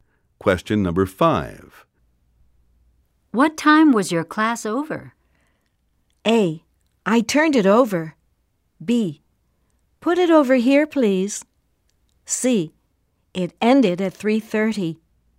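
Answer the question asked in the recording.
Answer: C: It ended at 3:30.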